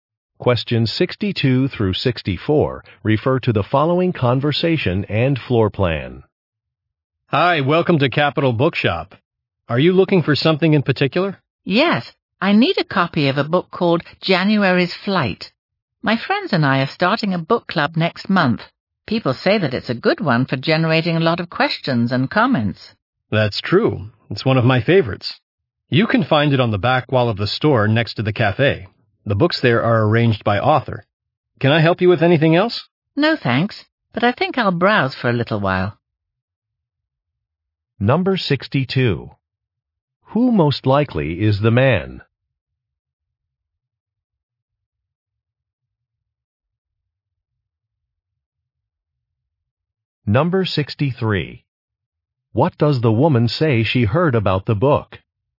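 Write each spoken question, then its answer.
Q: Who most likely is the man?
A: A bookstore employee

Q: What does the woman say she heard about the book?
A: It generates a lot of questions and comments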